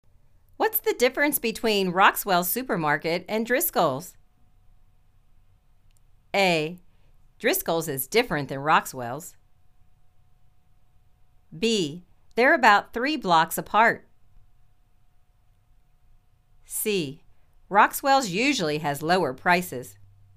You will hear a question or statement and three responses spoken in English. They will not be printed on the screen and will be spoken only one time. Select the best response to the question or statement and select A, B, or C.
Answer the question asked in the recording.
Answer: Roxwell's usually has lower prices.